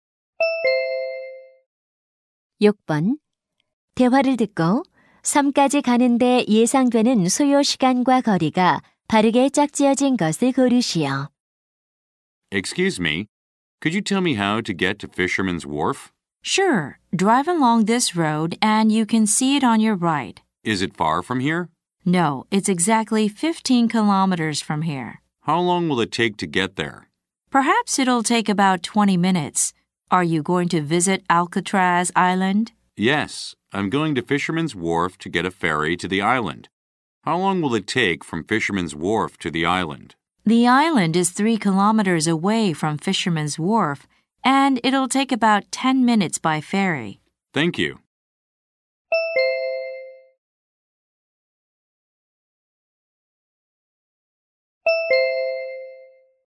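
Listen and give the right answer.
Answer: 약 30분 - 18킬로미터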